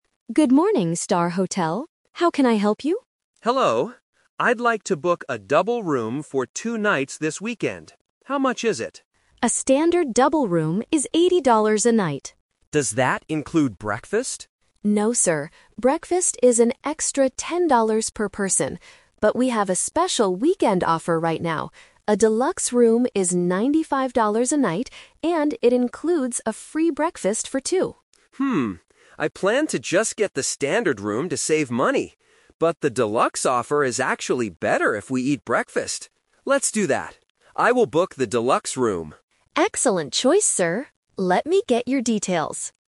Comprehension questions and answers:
Listen to a customer making a hotel reservation over the phone. Choose the correct answer (A, B, or C) for each question.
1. How much does the standard double room cost for one night?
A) $10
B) $80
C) $95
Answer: $80

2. What is the rule about breakfast for the standard room?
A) Customers have to pay extra for it.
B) It is included in the room price.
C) The hotel does not serve breakfast on weekends.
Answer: Customers have to pay extra for it.

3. What does the customer finally decide to book? (The Twist)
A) A standard double room without breakfast.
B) Two single rooms.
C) A Deluxe room.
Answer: A Deluxe room.

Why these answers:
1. The receptionist clearly states, "A standard double room is $80 a night." Trap: Option A ($10) is a trap because it is the price of the breakfast, not the room. Option C ($95) is a trap because it is the price of the Deluxe room.
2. When the customer asks if breakfast is included, the receptionist says, "No, sir. Breakfast is an extra $10 per person." Trap: Option B is a trap because breakfast is only included if you book the Deluxe room, not the standard room. Option C is a plausible hotel rule but is never mentioned in the audio.
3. This is the Twist. The customer initially wanted a standard room to save money ("I planned to just get the standard room"). However, he changes his mind because the Deluxe room includes free breakfast. He says, "I will book the Deluxe room." Trap: Option A is what he planned to do at first, but he rejected it. Option B is completely unmentioned (he asked for a double room, not single rooms).

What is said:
Receptionist: Good morning, Star Hotel. How can I help you?
Customer: Hello. I'd like to book a double room for two nights this weekend. How much is it?
Receptionist: A standard double room is $80 a night.
Customer: Does that include breakfast?
Receptionist: No, sir. Breakfast is an extra $10 per person. But we have a special weekend offer right now. A Deluxe room is $95 a night, and it includes a free breakfast for two.
I planned to just get the standard room to save money. But the Deluxe offer is actually better if we eat breakfast. Let's do that. I will book the Deluxe room.

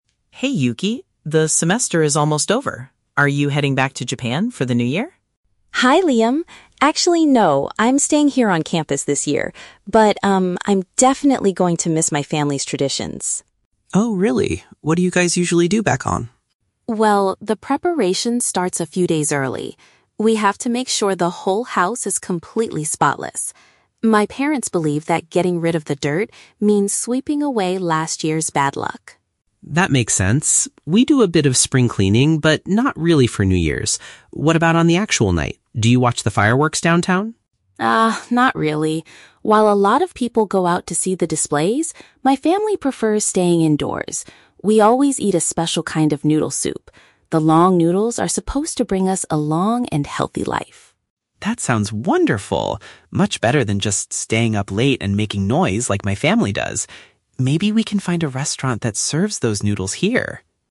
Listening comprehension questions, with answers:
Listen to a conversation between two international students and choose the correct answer (A, B, or C) for each question.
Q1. Why does Yuki's family clean their home before the new year?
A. To welcome guests for a big holiday party.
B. To prepare the house for the spring season.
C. To remove any misfortune from the previous twelve months.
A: To remove any misfortune from the previous twelve months.

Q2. What does Yuki say about the fireworks on New Year's Eve?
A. Her family avoids the crowds and chooses to remain at home.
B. She usually watches them in the city center with her friends.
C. They are too noisy and often disturb her family's sleep.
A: Her family avoids the crowds and chooses to remain at home.

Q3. What is the significance of the special meal Yuki's family eats?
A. It is the only dish they can order from local restaurants.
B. It represents a wish for longevity and physical well-being.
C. It is a traditional recipe passed down from her grandparents.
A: It represents a wish for longevity and physical well-being.

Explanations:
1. In the audio, Yuki says that getting rid of the dirt means "sweeping away last year's bad luck." Option (C) perfectly paraphrases this idea ("misfortune" = "bad luck", "previous twelve months" = "last year"). Option (B) is a trap; Liam mentions "spring cleaning," but this is his family's habit, not Yuki's reason. Option (A) is not mentioned.
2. When Liam asks if she watches the fireworks downtown, Yuki says "not really" and mentions that her family "prefers staying indoors." Option (A) uses synonyms like "remain at home" to express this. Option (B) is a trap; "downtown" (city center) and "see the displays" are mentioned, but Yuki rejects this idea. Option (C) is also a trap; Liam is the one who mentions "making noise," not Yuki.
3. Yuki explains that the long noodles are supposed to bring a "long and healthy life." Option (B) paraphrases this using advanced vocabulary ("longevity" = "long life", "physical well-being" = "healthy"). Option (A) is a trap; Liam suggests finding a restaurant later, but it is not the meaning of the meal. Option (C) sounds like a logical guess (plausible) but is never stated in the conversation.

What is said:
Liam: Hey Yuki, the semester is almost over. Are you heading back to Japan for the New Year?
Yuki: Hi Liam! Actually, no. I'm staying here on campus this year. But, um, I'm definitely going to miss my family's traditions.
Liam: Oh, really? What do you guys usually do back home?
Yuki: Well, the preparation starts a few days early. We have to make sure the whole house is completely spotless. My parents believe that getting rid of the dirt means sweeping away last year's bad luck.
Liam: That makes sense! We do a bit of spring cleaning, but not really for New Year's. What about on the actual night? Do you watch the fireworks downtown?
Yuki: Ah, not really. While a lot of people go out to see the displays, my family prefers staying indoors. We always eat a special kind of noodle soup. The long noodles are supposed to bring us a long and healthy life.
Liam: That sounds wonderful! Much better than just staying up late and making noise like my family does. Maybe we can find a restaurant that serves those noodles here!

